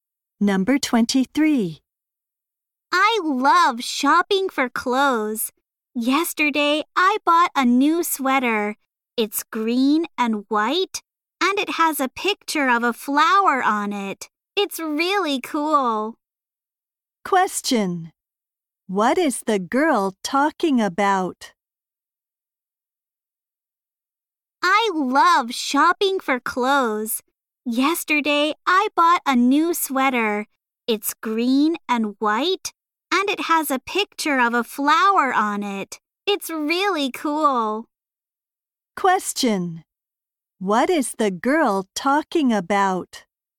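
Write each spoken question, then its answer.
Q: What is the girl talking about?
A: Her new sweater.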